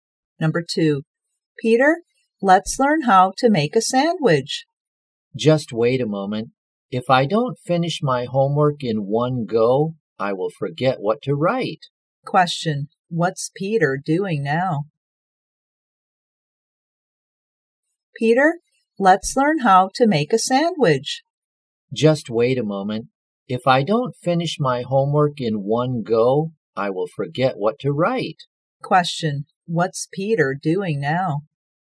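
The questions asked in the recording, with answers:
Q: what's Peter doing now?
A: Doing his homework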